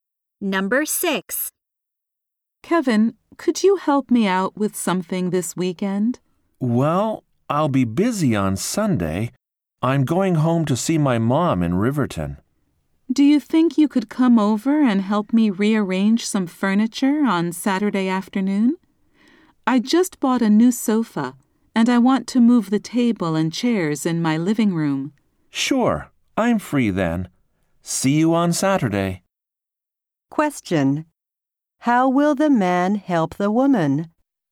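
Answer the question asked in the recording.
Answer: By helping her move furniture on Saturday afternoon.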